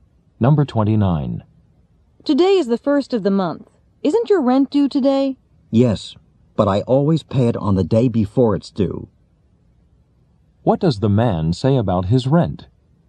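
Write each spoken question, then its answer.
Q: What does the man say about his rent?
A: He already paid it yesterday.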